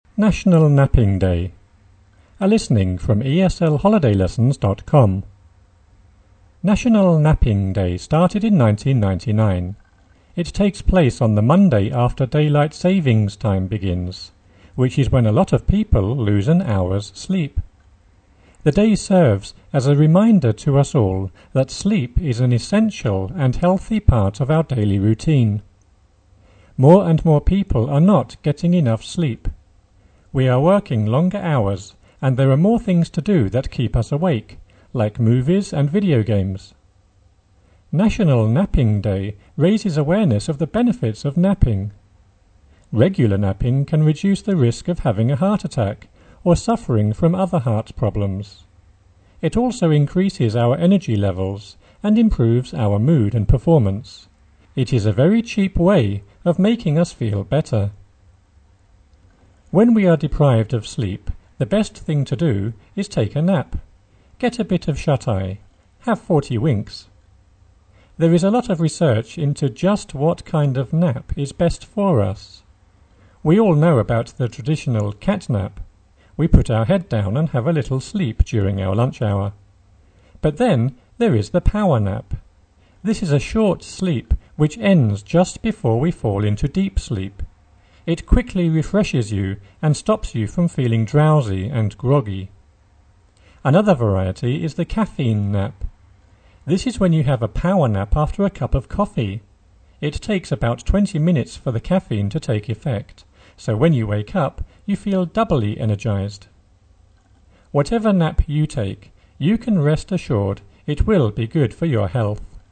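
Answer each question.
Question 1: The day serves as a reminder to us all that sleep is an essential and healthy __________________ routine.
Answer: part of our daily

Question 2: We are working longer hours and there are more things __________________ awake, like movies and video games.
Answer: to do that keep us

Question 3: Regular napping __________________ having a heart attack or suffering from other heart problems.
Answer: can reduce the risk of

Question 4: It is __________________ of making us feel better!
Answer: a very cheap way

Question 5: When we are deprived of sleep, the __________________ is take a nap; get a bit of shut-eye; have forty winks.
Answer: best thing to do

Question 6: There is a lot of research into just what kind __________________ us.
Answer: of nap is best for

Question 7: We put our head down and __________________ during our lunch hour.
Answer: have a little sleep

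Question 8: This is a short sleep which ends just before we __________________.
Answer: fall into deep sleep

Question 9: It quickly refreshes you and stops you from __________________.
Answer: feeling drowsy and groggy

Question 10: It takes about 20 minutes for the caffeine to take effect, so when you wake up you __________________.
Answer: feel doubly energized

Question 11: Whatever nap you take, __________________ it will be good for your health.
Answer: you can rest assured

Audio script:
National Napping Day started in 1999. It takes place on the Monday after daylight savings time begins, which is when a lot of people lose an hour's sleep. The day serves as a reminder to us all that sleep is an essential and healthy part of our daily routine. More and more people are not getting enough sleep. We are working longer hours and there are more things to do that keep us awake, like movies and video games. 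National Napping Day raises awareness of the benefits of napping. Regular napping can reduce the risk of having a heart attack or suffering from other heart problems.
having a heart attack
Regular napping can reduce the risk by / of having a heart attack or suffering from other heart problems. It also increases our energy levels and improves our mood / moody and performance. It is a very cheap / cheep way of making us feel better!
When we are deprived of asleep / sleep, the best thing to do is take a nap; get / bet a bit of shut-eye; have forty winks. There is a lot of research into just what kind of nap is best for us. We all know about the tradition / traditional cat-nap. We put our head down / up and have a little sleep during our lunch hour. But then there is the power-nap. This is a short sleep which ends just before we falling / fall into deep sleep. It quickly refreshes / refreshments you and stops you from feeling drowsy and groggy. 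Another variety is the caffeine nap. This is when you have a power nap after a cup of coffee. It takes about 20 minutes for the caffeine to take / make effect, so when you wake up you feel doubly energized. Whatever nap you take, you can rest assured / insured it will be good for your health.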